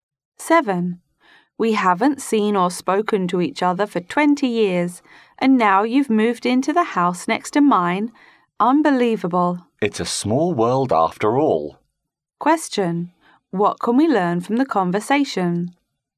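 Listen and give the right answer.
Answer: Two old friends who lost touch for 20 years are now neighbours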